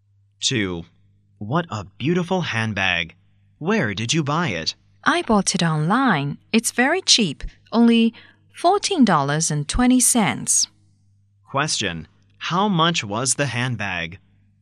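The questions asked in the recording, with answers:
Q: How much was the handbag?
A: $14.20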